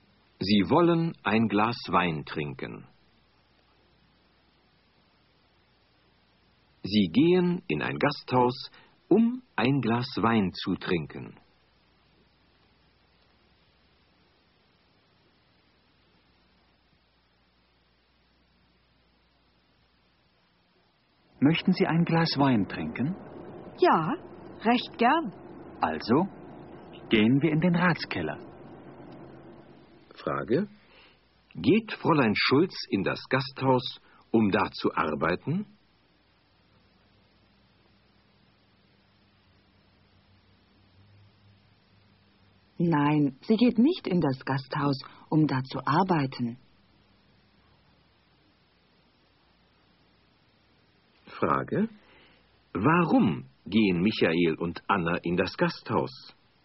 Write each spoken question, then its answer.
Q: Warum gehen Michael und Anna in das Gasthaus?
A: Sie gehen in das Gasthaus, um ein Glas Wein zu trinken.